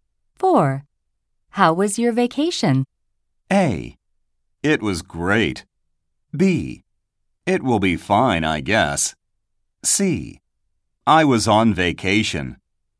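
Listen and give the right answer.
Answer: A: It was great.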